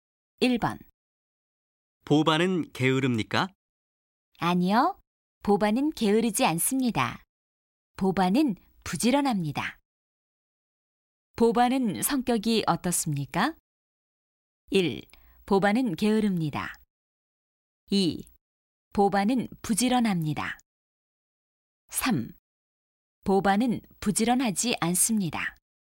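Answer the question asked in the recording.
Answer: 2: 보바는 부지런합니다.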